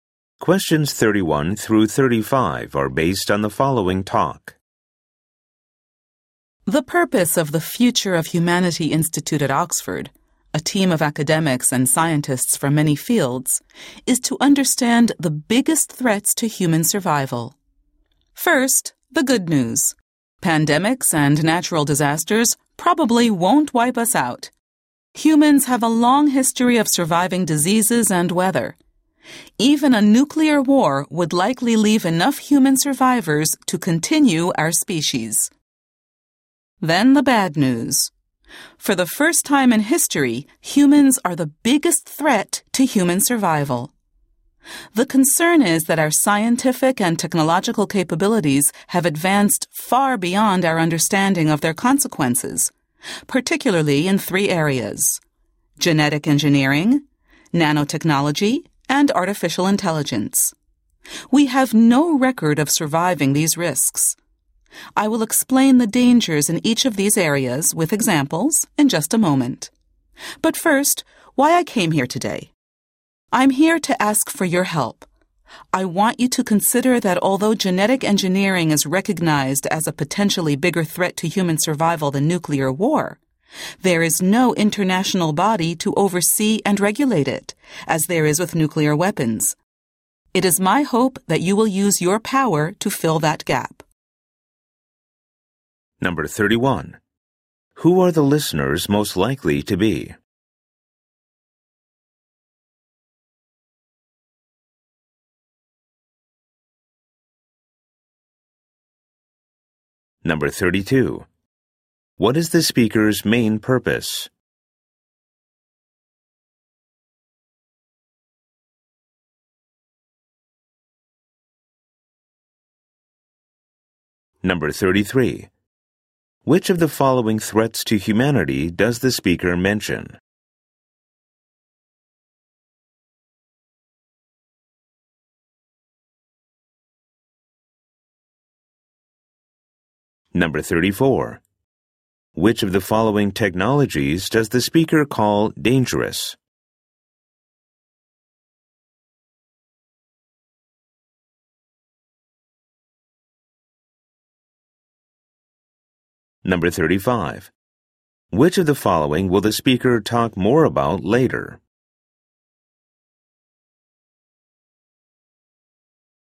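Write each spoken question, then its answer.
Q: What is the speaker's main purpose?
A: To ask for help creating an international body to regulate genetic engineering

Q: Which of the following technologies does the speaker call dangerous?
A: Genetic engineering, nanotechnology, artificial intelligence

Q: Which of the following will the speaker talk more about later?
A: Examples of the dangers in each area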